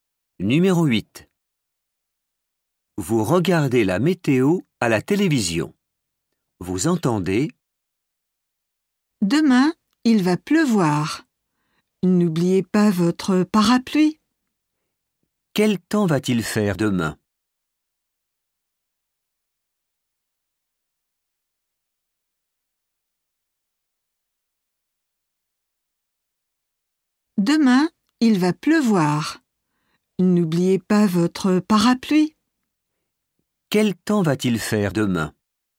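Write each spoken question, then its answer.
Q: Quel temps va-t-il faire demain?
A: il va pleuvoir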